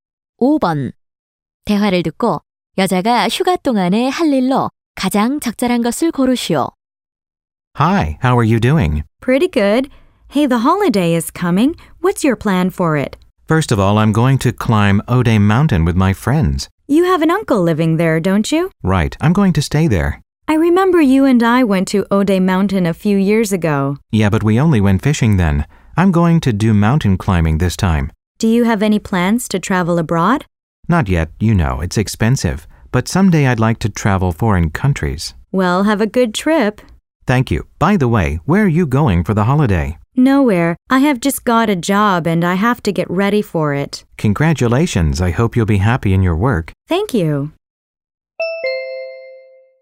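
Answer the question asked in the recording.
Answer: 오대산 등산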